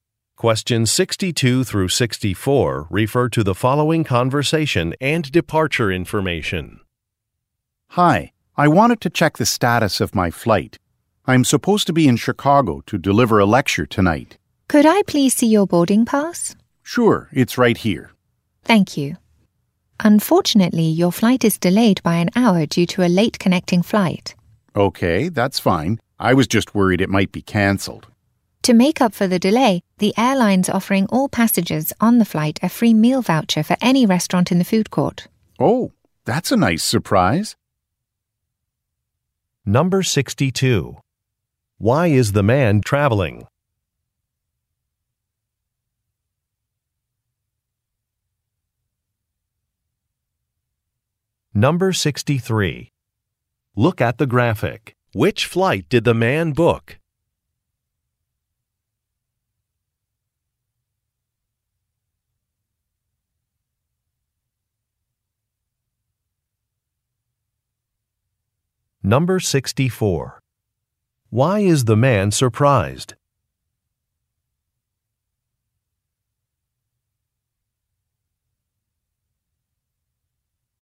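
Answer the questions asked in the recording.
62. To deliver a lecture in Chicago
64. The airline is offering a free meal voucher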